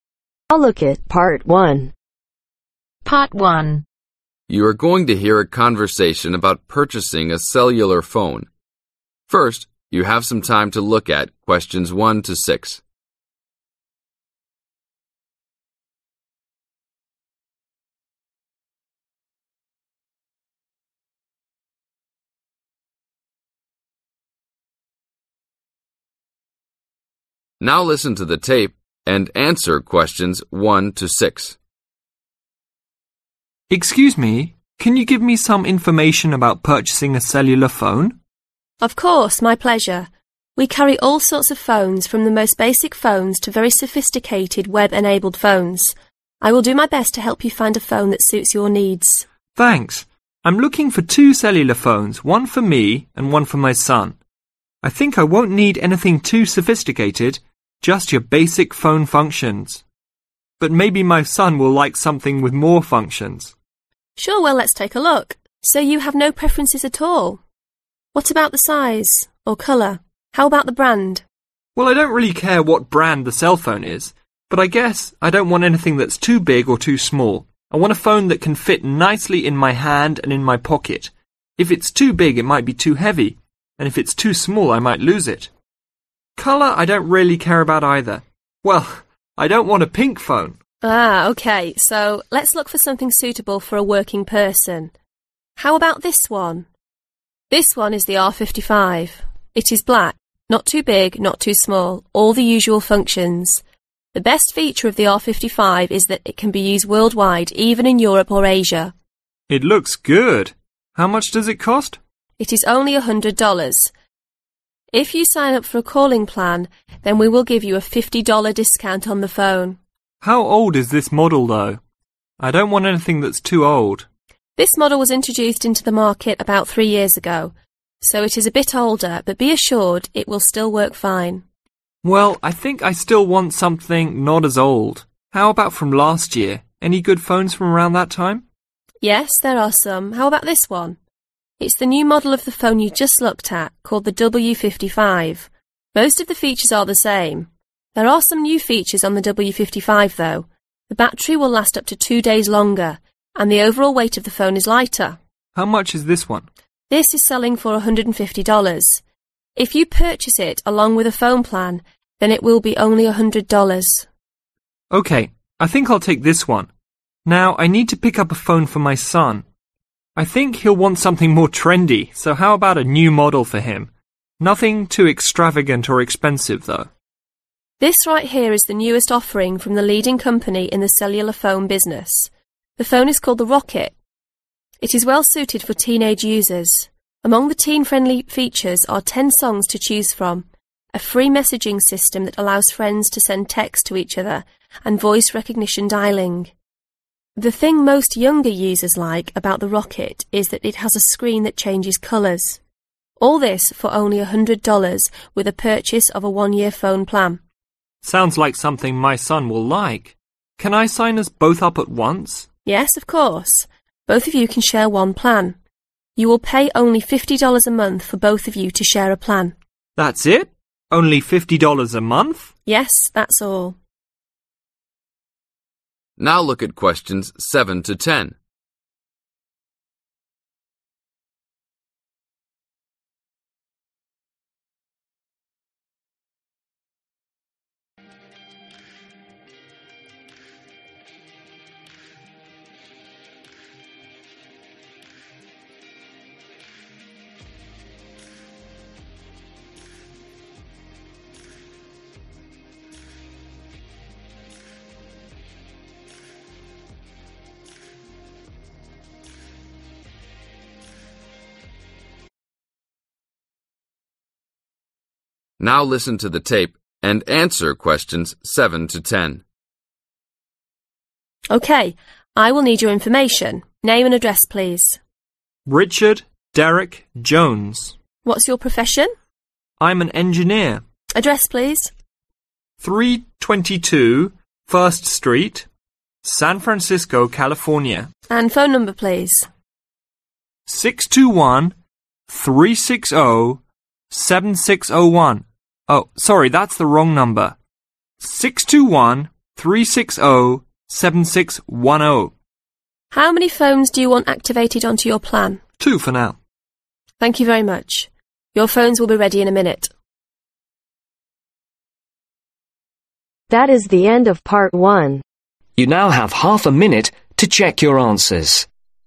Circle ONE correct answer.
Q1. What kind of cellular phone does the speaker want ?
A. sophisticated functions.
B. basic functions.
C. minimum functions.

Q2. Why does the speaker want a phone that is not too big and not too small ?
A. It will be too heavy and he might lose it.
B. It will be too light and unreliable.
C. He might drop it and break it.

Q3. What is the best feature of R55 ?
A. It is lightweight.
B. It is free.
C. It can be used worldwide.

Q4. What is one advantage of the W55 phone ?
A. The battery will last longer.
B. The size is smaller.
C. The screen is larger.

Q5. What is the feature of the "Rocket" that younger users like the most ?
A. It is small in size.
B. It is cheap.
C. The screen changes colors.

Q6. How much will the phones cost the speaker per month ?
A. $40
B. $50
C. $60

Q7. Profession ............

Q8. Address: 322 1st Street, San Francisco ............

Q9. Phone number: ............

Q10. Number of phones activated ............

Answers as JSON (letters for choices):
{"1": "B", "2": "A", "3": "C", "4": "A", "5": "C", "6": "B", "7": "Engineer", "8": "California", "9": "6213607610", "10": "2/two"}